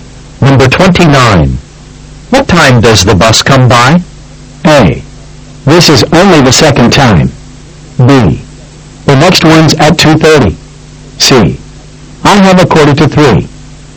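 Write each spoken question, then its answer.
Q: What time does the bus come by?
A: B: The next one's at 2:30.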